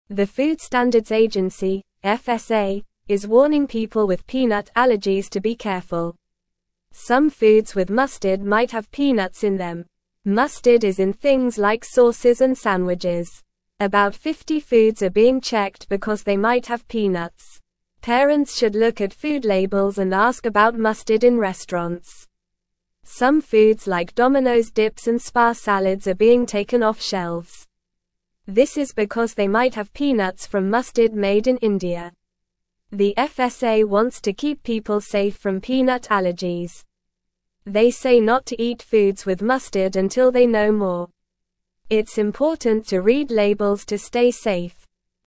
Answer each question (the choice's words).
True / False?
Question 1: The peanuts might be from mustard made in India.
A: True

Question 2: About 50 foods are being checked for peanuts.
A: True

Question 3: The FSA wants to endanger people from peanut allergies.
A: False

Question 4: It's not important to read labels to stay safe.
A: False

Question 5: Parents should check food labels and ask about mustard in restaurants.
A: True

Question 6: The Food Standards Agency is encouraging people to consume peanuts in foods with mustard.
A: False

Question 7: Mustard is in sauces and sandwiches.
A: True

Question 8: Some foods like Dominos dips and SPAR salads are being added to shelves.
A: False

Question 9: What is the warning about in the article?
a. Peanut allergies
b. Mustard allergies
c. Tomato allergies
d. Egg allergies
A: Peanut allergies

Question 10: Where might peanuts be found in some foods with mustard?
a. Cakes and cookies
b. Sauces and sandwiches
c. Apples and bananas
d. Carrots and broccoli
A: Sauces and sandwiches

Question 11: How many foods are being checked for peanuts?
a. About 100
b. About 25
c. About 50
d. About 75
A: About 50

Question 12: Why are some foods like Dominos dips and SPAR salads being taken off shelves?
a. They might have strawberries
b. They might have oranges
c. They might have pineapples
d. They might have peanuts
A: They might have peanuts

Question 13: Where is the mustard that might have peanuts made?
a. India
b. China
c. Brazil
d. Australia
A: India

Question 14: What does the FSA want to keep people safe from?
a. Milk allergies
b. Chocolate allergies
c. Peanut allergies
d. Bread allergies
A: Peanut allergies

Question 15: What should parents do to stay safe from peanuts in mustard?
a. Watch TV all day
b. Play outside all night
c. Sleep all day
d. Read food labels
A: Read food labels

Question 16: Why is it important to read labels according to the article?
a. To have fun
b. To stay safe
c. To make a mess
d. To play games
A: To stay safe

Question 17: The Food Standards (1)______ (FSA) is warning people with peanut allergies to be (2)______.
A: Agency

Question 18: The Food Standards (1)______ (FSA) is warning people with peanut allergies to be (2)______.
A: careful

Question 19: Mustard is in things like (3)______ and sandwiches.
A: sauces

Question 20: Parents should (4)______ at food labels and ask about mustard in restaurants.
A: look

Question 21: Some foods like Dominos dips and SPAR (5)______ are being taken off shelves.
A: salads

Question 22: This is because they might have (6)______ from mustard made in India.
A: peanuts

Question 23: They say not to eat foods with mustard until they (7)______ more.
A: know

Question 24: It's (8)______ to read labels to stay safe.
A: important

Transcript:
The Food Standards Agency (FSA) is warning people with peanut allergies to be careful. Some foods with mustard might have peanuts in them. Mustard is in things like sauces and sandwiches. About 50 foods are being checked because they might have peanuts. Parents should look at food labels and ask about mustard in restaurants.
Some foods like Dominos dips and SPAR salads are being taken off shelves. This is because they might have peanuts from mustard made in India. The FSA wants to keep people safe from peanut allergies. They say not to eat foods with mustard until they know more. It's important to read labels to stay safe.

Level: Level 1